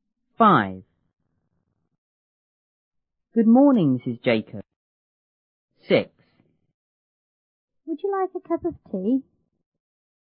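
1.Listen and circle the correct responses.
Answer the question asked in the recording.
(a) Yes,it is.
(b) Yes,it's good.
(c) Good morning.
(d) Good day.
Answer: (c) Good morning.

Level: 初中英语广州版1B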